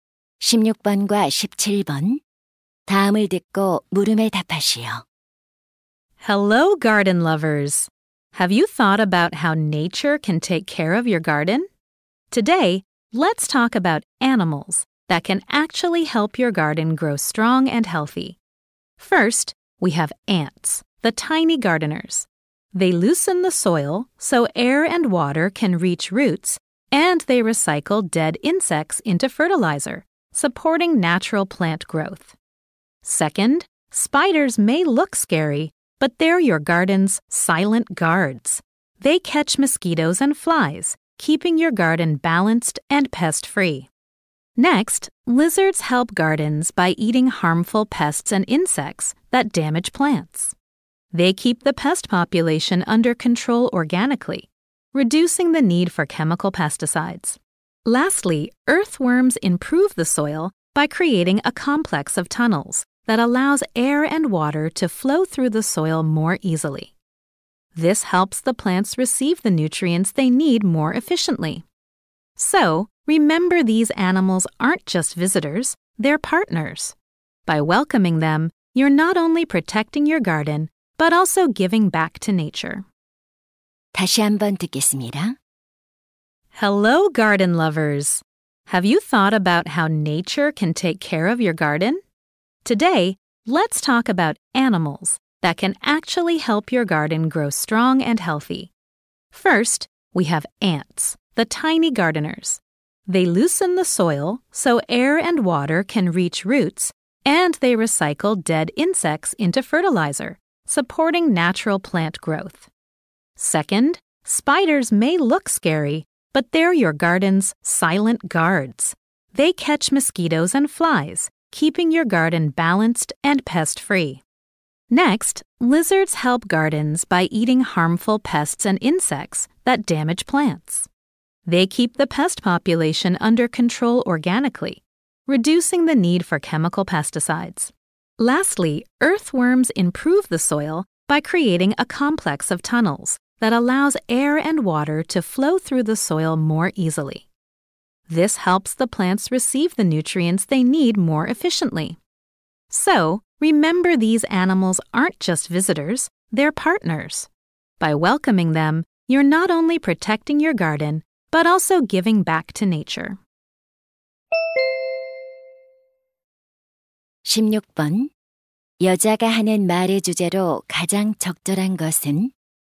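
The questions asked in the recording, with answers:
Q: 여자가 하는 말의 주제로 가장 적절한 것은?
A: 정원에 도움이 되는 동물들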